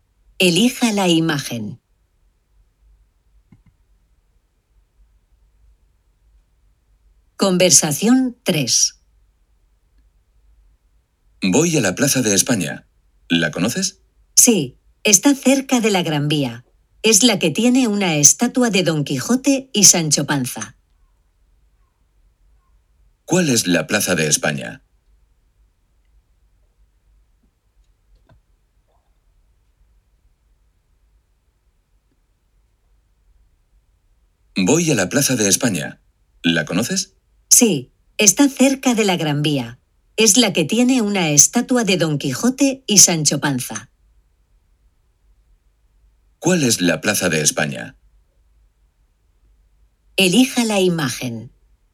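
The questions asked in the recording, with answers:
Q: ¿Cuál es la Plaza de España?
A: La que tiene una estatua de Don Quijote y Sancho Panza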